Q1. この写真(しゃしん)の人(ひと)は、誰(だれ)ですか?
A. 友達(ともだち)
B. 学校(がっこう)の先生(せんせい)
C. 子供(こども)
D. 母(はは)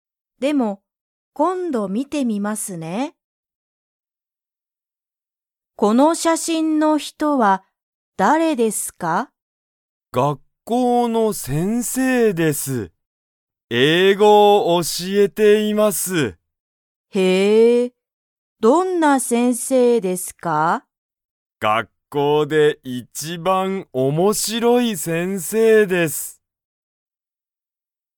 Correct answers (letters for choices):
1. B

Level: Level 1